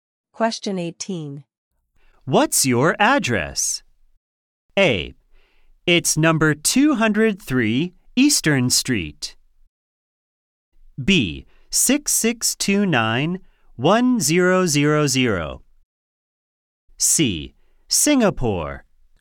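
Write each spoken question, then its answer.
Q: What's your address?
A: A: It's number 203 Eastern Street.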